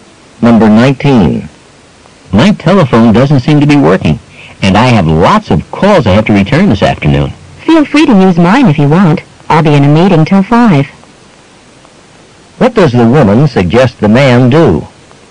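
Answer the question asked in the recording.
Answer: Use her telephone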